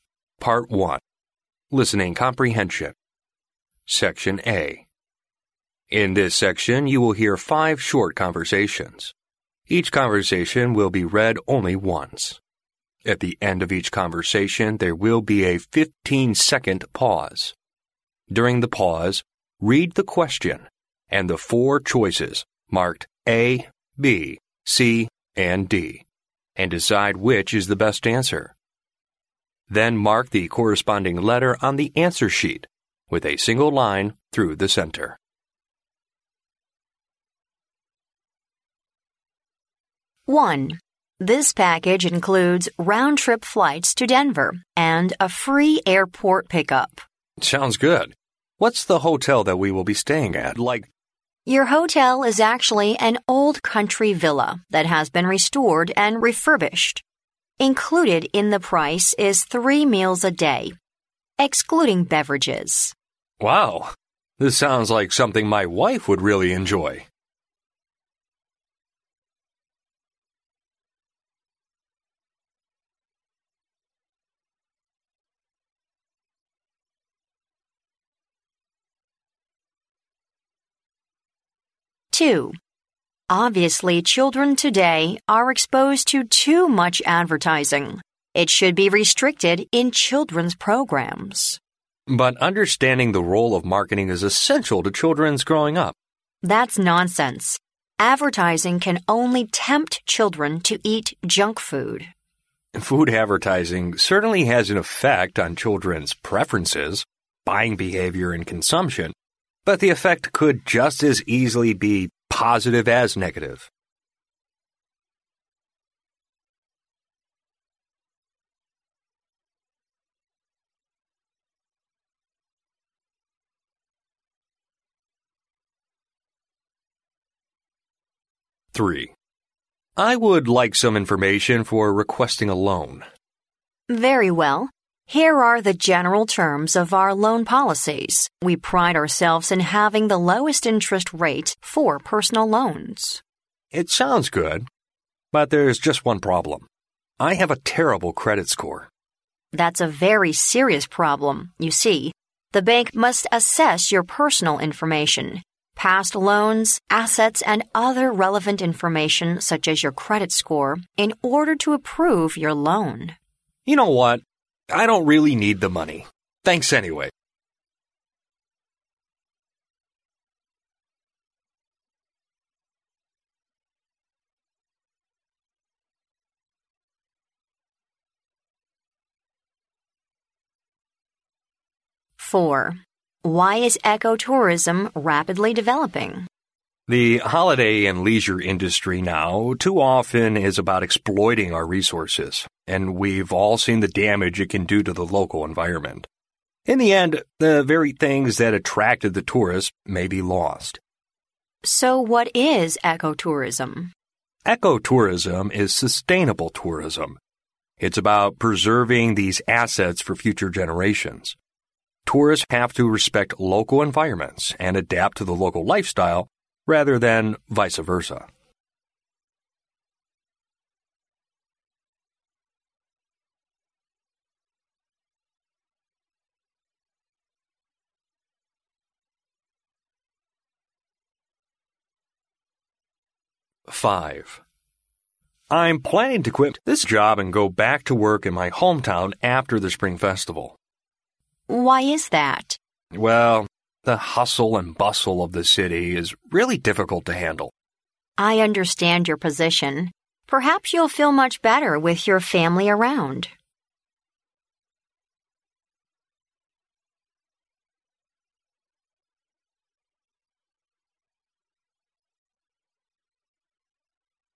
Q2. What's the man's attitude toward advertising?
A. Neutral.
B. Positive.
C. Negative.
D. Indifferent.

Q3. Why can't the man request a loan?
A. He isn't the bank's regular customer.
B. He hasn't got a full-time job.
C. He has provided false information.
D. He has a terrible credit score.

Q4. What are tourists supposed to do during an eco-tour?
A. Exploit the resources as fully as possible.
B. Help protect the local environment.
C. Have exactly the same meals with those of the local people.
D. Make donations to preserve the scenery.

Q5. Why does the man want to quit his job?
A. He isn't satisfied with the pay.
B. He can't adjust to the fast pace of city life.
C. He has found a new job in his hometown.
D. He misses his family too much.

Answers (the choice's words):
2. Neutral.
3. He has a terrible credit score.
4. Help protect the local environment.
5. He can't adjust to the fast pace of city life.

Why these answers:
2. 录音中女士对于广告的态度是消极的,男士说到"as easily be positive as negative",意为可以是积极的也可以是消极的,因此他的态度是中立的。故A选项为正确答案。
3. 录音中男士说到自己有一个"terrible credit score",女士说到这是个严重的问题,银行在批准贷款前会评估包括个人信用在内的一系列信息。因此D选项为正确答案。
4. 对话中女士问到什么是生态旅游,男士说到"sustainable""respect local environments"等词。因此B选项为正确答案。
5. 录音中男士说到的"hustle and bustle"意为"熙熙攘攘",可见是城市的快节奏让他想要辞职。因此B选项为正确答案。